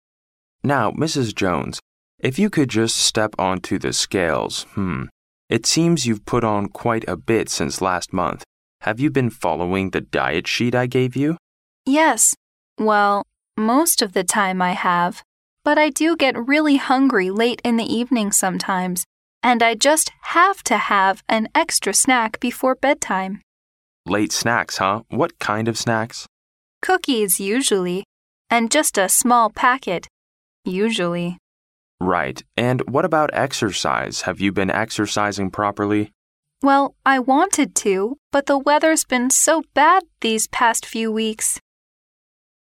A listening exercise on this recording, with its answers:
Where did the conversation probably take place?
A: In a clinic.

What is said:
M: Now, Mrs. Jones, if you could just step onto the scales...Hmm. It seems you've put on quite a bit since last month. Have you been following the diet sheet I gave you?
W: Yes...Well, most of the time I have. But I do get really hungry late in the evening sometimes, and I just have to have an extra snack before bedtime.
M: Late snacks, huh? What kind of snacks?
W: Cookies usually. And just a small packet...usually.
M: Right. And what about exercise? Have you been exercising properly?
W: Well, I wanted to, but the weather's been so bad these past few weeks ...